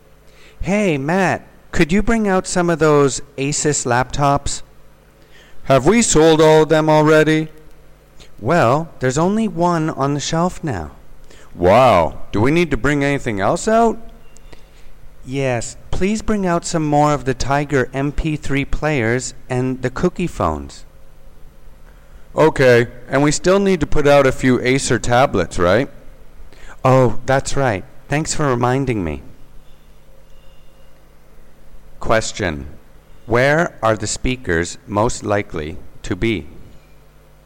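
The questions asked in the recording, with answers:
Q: Where are the speakers most likely to be?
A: In an electronics store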